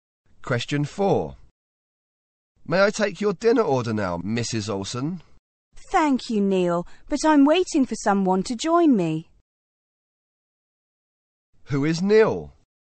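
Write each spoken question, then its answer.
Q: Who is Neil?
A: A waiter.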